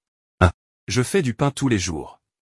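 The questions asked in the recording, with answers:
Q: Qui suis-je?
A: boulanger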